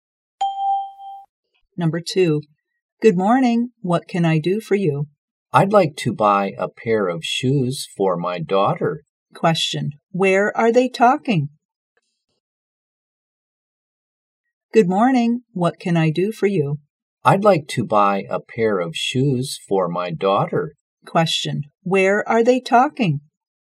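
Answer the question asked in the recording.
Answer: In a shoe store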